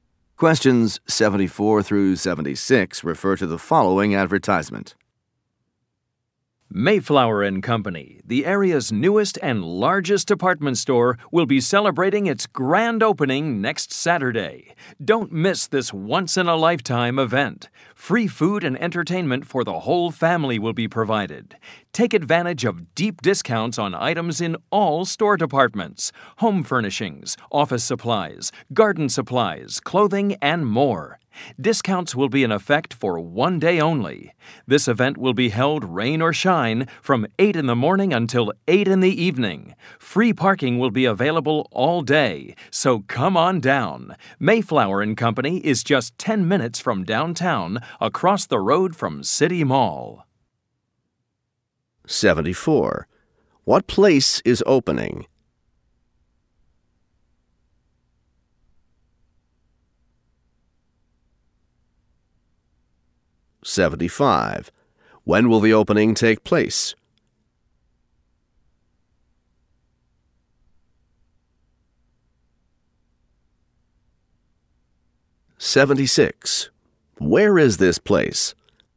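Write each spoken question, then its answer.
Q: What place is opening?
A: A department store

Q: When will the opening take place?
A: Next Saturday

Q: Where is this place?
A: Across the road from City Mall, 10 minutes from downtown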